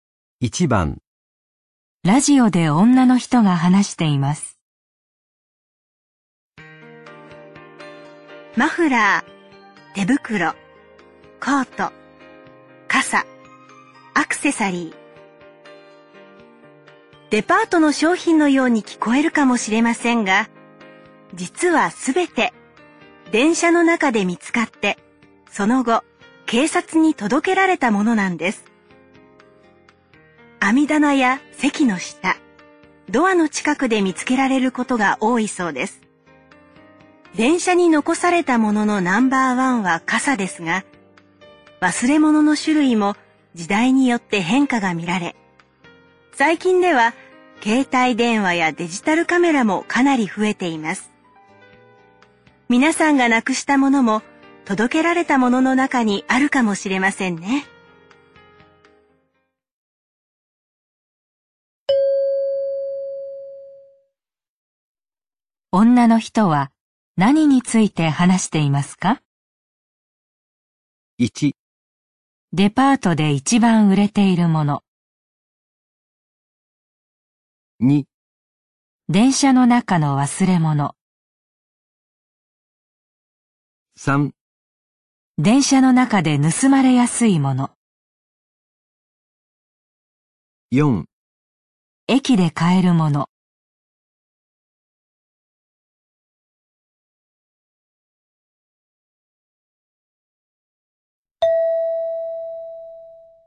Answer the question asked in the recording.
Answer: 2

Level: N3 Listening · Test 12